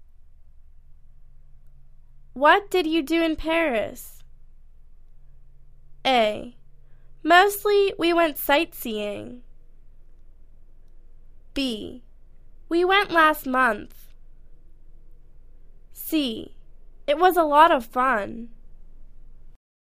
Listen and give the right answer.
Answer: Mostly, we went sightseeing.